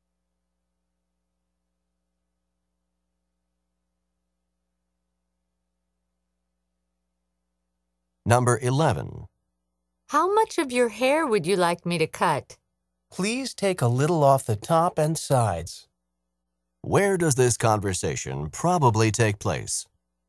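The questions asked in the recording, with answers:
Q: Where does this conversation probably take place?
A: At a hair salon / barbershop.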